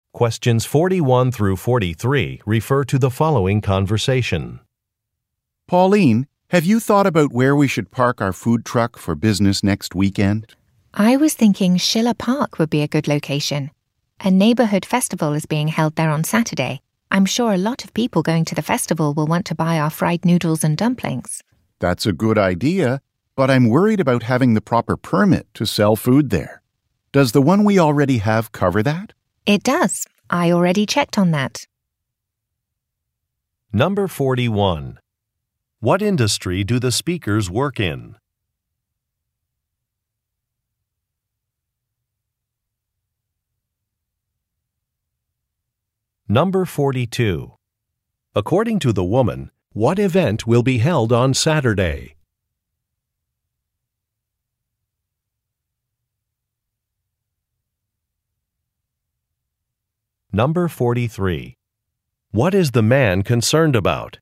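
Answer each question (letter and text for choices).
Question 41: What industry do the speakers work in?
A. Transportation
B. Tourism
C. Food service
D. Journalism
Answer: C. Food service

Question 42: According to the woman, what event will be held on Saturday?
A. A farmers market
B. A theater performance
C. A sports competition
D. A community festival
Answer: D. A community festival

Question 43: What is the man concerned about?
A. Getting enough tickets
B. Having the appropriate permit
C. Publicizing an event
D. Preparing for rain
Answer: B. Having the appropriate permit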